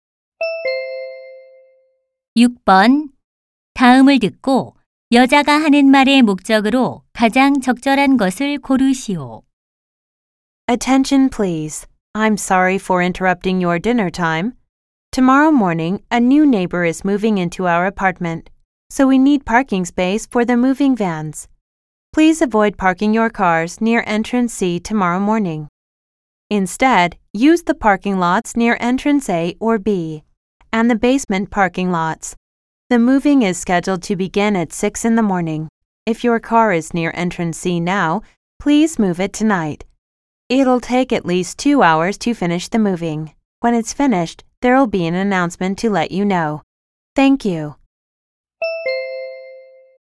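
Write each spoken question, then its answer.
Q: 다음을 듣고 여자가 하는 말의 목적으로 가장 적절한 것을 고르시오.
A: 이사 차량을 위해 C 출입구 근처 주차 자제 요청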